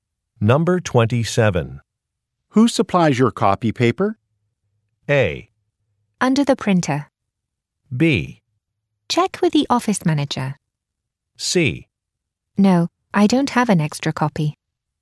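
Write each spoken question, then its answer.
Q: Who supplies your copy paper?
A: B: Check with the office manager.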